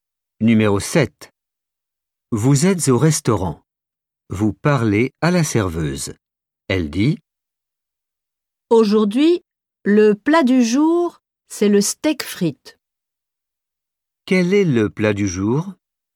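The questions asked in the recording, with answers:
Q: Quel est le plat du jour ?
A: le steak frites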